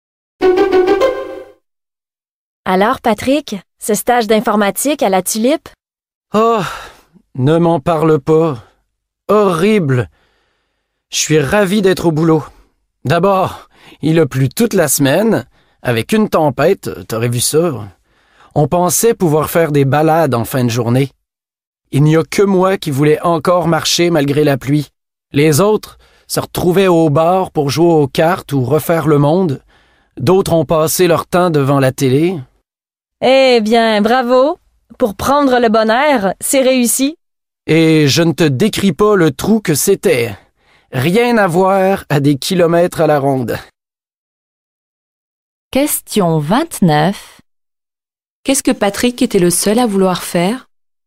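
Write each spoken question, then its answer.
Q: Qu'est-ce que Patrick était le seul à vouloir faire?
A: Marcher malgré la pluie.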